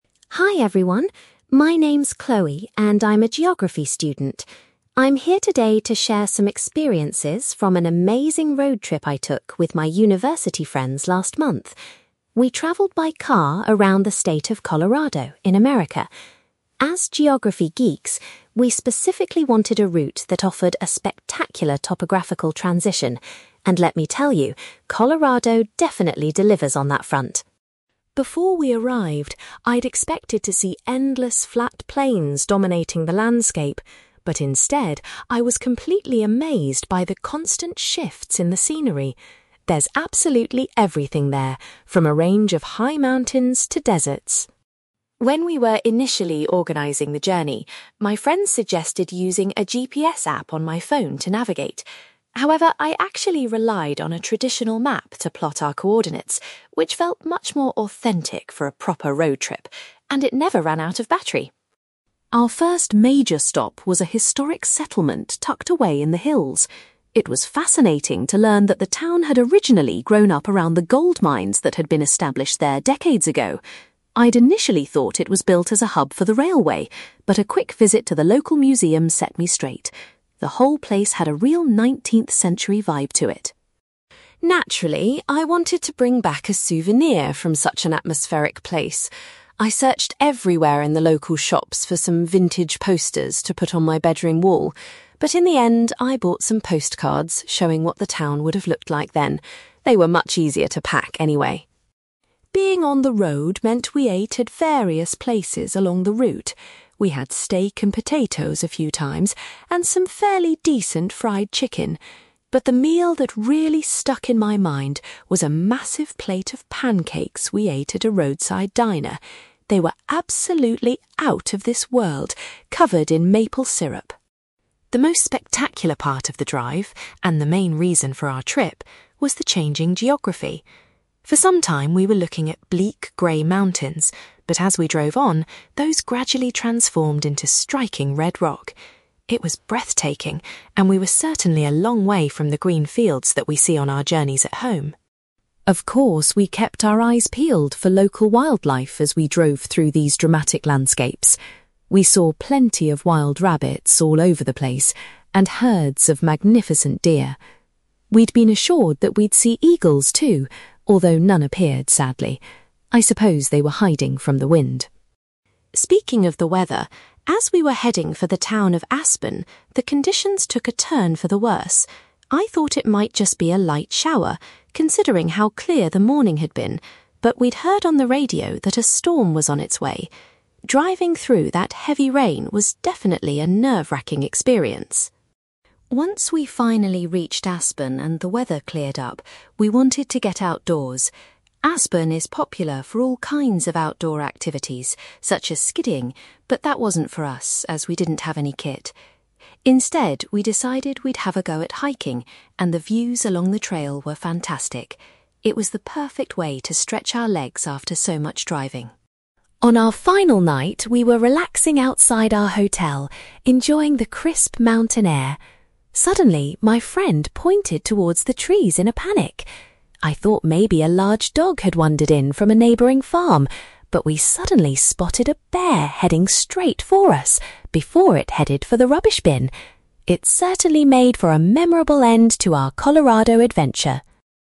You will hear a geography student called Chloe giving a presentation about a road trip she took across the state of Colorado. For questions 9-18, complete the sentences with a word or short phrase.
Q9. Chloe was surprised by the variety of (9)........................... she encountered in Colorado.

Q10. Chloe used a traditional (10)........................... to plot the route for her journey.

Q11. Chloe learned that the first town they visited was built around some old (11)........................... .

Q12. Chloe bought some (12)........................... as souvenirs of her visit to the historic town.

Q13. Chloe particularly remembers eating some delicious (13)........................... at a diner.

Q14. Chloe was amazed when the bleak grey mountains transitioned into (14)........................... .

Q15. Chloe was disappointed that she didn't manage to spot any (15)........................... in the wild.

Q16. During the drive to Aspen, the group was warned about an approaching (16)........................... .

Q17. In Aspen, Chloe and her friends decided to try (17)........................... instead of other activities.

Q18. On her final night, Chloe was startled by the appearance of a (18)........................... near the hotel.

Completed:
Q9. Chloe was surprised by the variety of scenery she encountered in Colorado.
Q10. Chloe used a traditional map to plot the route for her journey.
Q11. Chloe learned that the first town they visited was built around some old gold mines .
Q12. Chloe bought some postcards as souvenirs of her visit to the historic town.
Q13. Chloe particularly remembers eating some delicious pancakes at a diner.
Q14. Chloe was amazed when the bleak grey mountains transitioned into red rock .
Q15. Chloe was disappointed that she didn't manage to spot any eagles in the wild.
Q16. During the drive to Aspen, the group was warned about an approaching storm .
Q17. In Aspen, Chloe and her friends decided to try hiking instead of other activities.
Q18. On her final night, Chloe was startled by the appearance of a bear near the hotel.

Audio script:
Chloe: Hi everyone. My name's Chloe, and I'm a geography student. I'm here today to share some experiences from an amazing road trip I took with my university friends last month. We travelled by car around the state of Colorado, in America. As geography geeks, we specifically wanted a route that offered a spectacular topographical transition, and let me tell you, Colorado definitely delivers on that front.
Before we arrived, I'd expected to see endless flat plains dominating the landscape, but instead I was completely amazed by the constant shifts in the scenery. There's absolutely everything there, from a range of high mountains to deserts.
When we were initially organizing the journey, my friends suggested using a GPS app on my phone to navigate. However, I actually relied on a traditional map to plot our coordinates, which felt much more authentic for a proper road trip, and it never ran out of battery!
Our first major stop was a historic settlement tucked away in the hills. It was fascinating to learn that the town had originally grown up around the gold mines that had been established there decades ago. I'd initially thought it was built as a hub for the railway, but a quick visit to the local museum set me straight. The whole place had a real nineteenth-century vibe to it.
Naturally, I wanted to bring back a souvenir from such an atmospheric place. I searched everywhere in the local shops for some vintage posters to put on my bedroom wall, but in the end, I bought some postcards showing what the town would have looked like then. They were much easier to pack, anyway!
Being on the road meant we ate at various places along the route. We had steak and potatoes a few times, and some fairly decent fried chicken. But the meal that really stuck in my mind was a massive plate of pancakes we ate at a roadside diner. They were absolutely out of this world, covered in maple syrup.
The most spectacular part of the drive, and the main reason for our trip, was the changing geography. For some time we were looking at bleak grey mountains, but as we drove on, those gradually transformed into striking red rock. It was breathtaking, and we were certainly a long way from the green fields that we see on our journeys at home.
Of course, we kept our eyes peeled for local wildlife as we drove through these dramatic landscapes. We saw plenty of wild rabbits all over the place, and herds of magnificent deer. We'd been assured that we'd see eagles too, although none appeared, sadly. I suppose they were hiding from the wind.
Speaking of the weather, as we were heading for the town of Aspen, the conditions took a turn for the worse. I thought it might just be a light shower, considering how clear the morning had been, but we'd heard on the radio that a storm was on its way. Driving through that heavy rain was definitely a nerve-wracking experience.
Once we finally reached Aspen and the weather cleared up, we wanted to get outdoors. Aspen is popular for all kinds of outdoor activities such as skiing, but that wasn't for us, as we didn't have any kit. Instead, we decided we'd have a go at hiking, and the views along the trail were fantastic. It was the perfect way to stretch our legs after so much driving.
On our final night, we were relaxing outside our hotel, enjoying the crisp mountain air. Suddenly, my friend pointed towards the trees in a panic. I thought maybe a large dog had wandered in from a neighbouring farm, but we suddenly spotted a bear heading straight for us before it headed for the rubbish bin! It certainly made for a memorable end to our Colorado adventure!

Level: B2